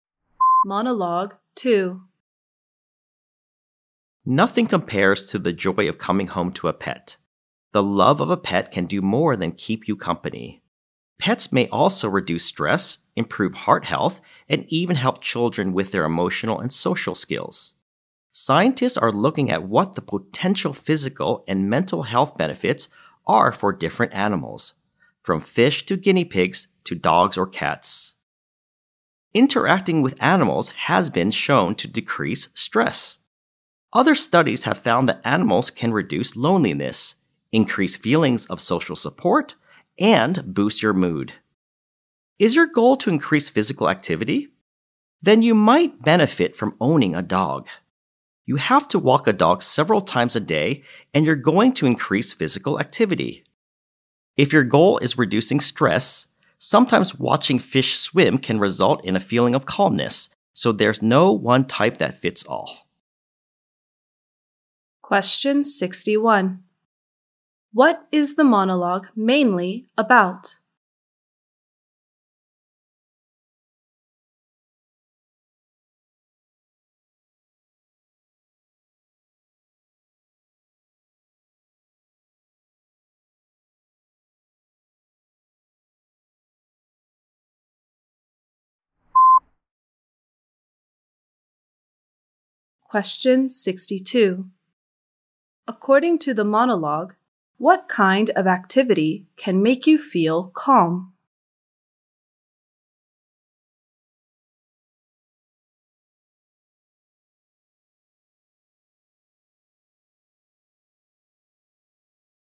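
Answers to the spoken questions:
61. The health benefits of owning pets
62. Watching fish swim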